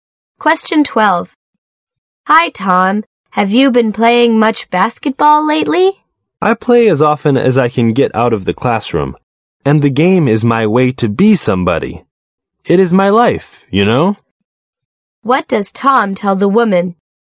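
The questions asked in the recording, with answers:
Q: What does Tom tell the woman?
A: Basketball is very important to him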